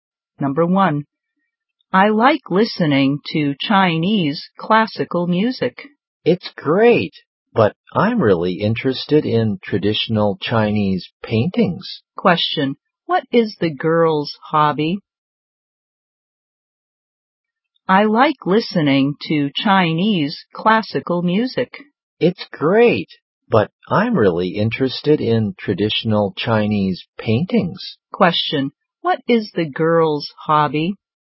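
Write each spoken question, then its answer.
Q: What is the girl's hobby?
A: Traditional Chinese paintings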